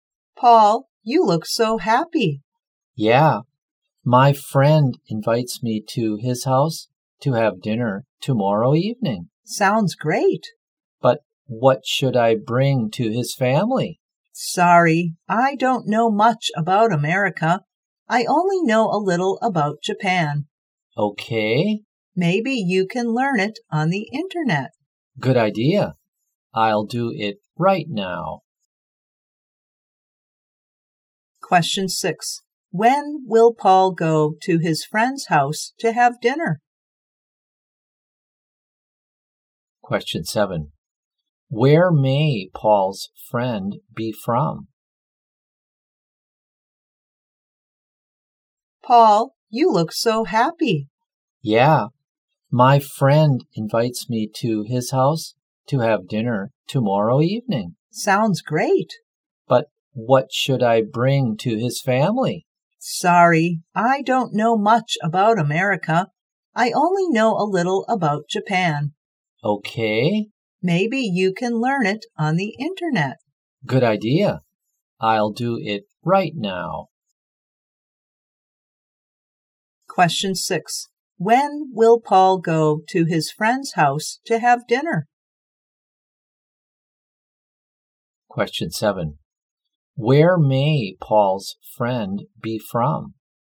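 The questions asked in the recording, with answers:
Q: When will Paul go to his friend's house to have dinner?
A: Tomorrow evening.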